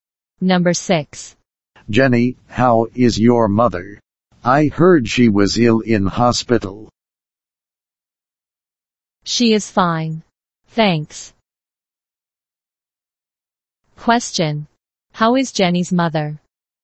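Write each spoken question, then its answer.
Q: How is Jenny's mother?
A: She is fine.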